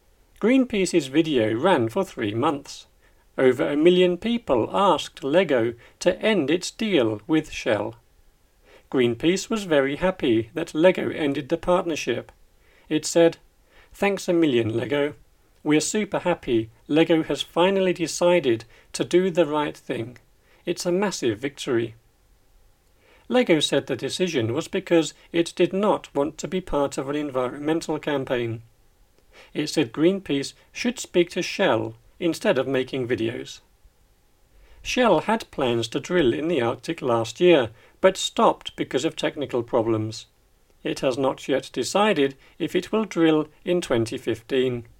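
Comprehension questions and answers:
Listen and choose the correct word in the grey box with the "up / down" arrows.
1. Greenpeace's video ran for three .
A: months

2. Over a million people asked Lego to end its with Shell.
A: deal

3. It said: "Thanks a , Lego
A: million

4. We're super Lego has finally decided to do the right .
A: happy; thing

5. It's a massive ."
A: victory

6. Lego said the decision was because it did not want to be part of an campaign.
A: environmental

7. It said Greenpeace should speak to Shell of making videos.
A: instead

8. Shell had plans to drill in the Arctic last year but stopped because of problems.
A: technical

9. It has not decided if it will drill in 2015.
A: yet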